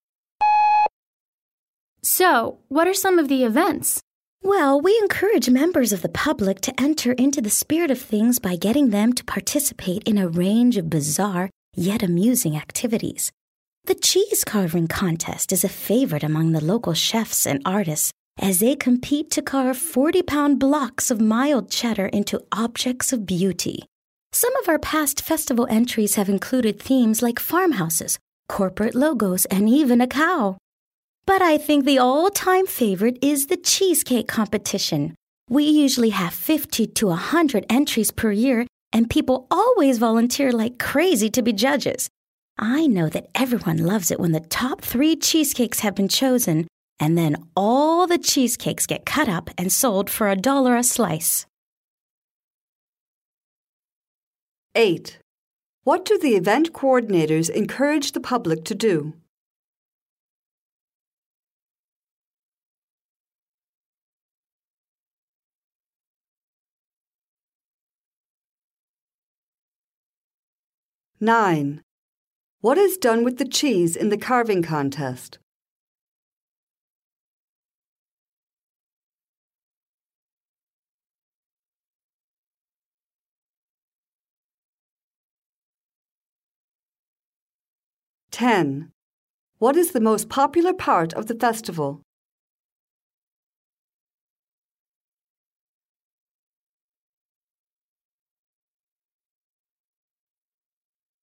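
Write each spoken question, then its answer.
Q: What do the event coordinators encourage the public to do?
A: Take part in bizarre but amusing activities

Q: What is done with the cheese in the carving contest?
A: 40-pound blocks of cheddar are carved into objects of beauty

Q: What is the most popular part of the festival?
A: The cheesecake competition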